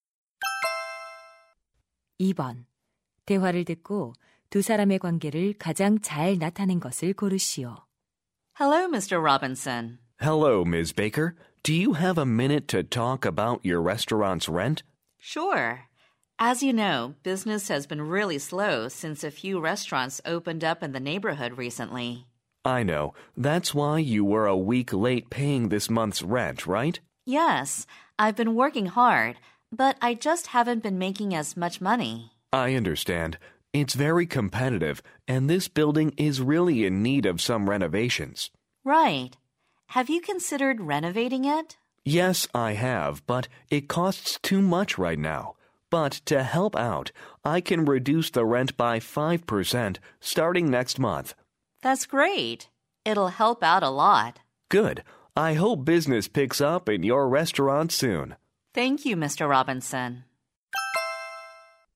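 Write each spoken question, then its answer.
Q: 대화를 듣고 두 사람의 관계를 가장 잘 나타낸 것을 고르시오.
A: 건물주 – 식당 주인(세입자)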